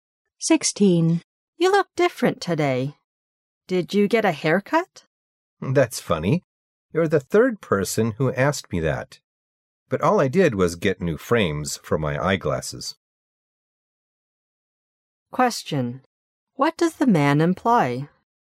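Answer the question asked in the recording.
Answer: He didn't get a haircut; he only got new frames for his glasses.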